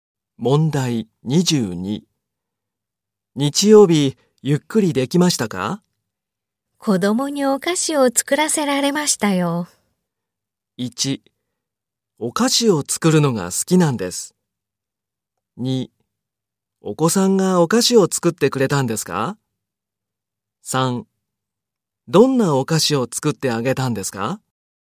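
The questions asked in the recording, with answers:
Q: 日曜日、ゆっくりできましたか?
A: 3: どんなお菓子を作ってあげたんですか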